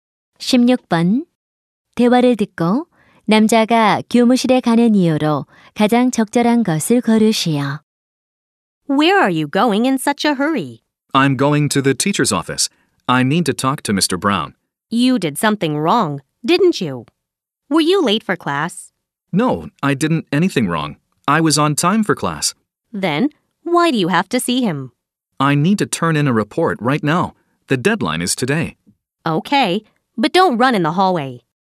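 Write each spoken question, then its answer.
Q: 대화를 듣고 남자가 교무실에 가는 이유로 가장 적절한 것을 고르시오.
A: 보고서를 제출하기 위해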